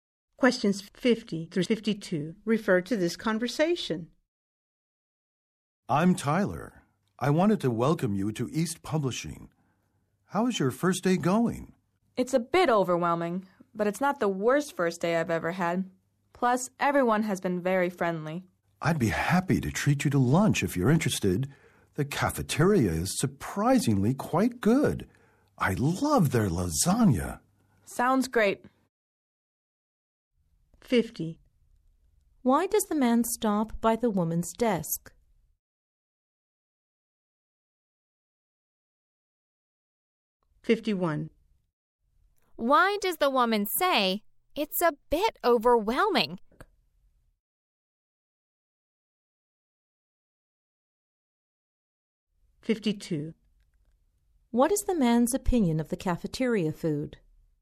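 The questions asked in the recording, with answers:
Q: Why does the man stop by the woman's desk?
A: To welcome her on her first day

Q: What is the man's opinion of the cafeteria food?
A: It is surprisingly good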